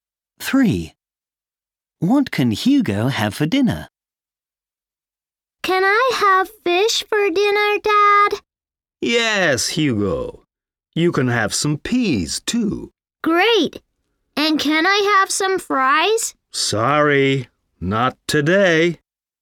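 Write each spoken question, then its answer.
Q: What can Hugo have for dinner?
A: fish and peas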